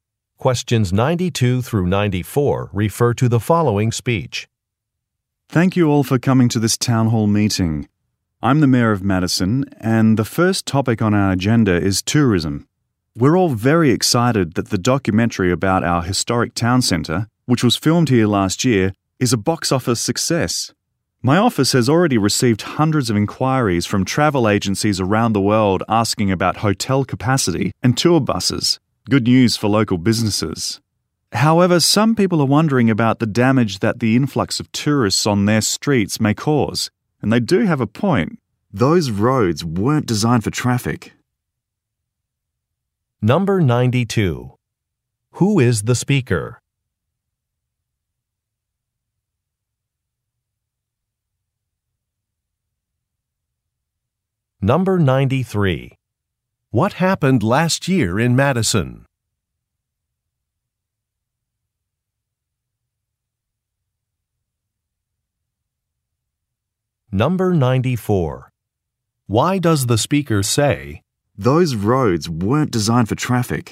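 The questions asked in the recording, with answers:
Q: Who is the speaker?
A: The mayor of Madison

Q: What happened last year in Madison?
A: A documentary was filmed there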